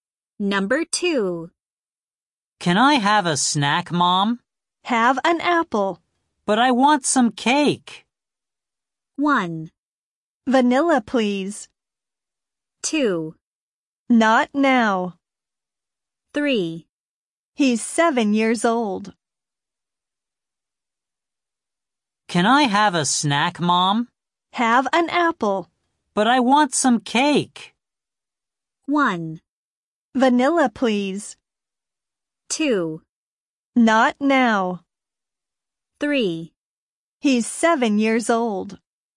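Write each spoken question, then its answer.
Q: But I want some cake.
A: 2: Not now.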